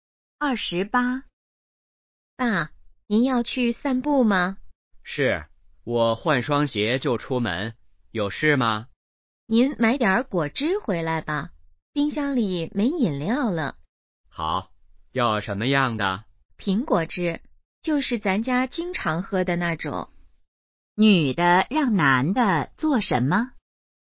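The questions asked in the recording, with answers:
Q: 女的让男的做什么?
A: 买苹果汁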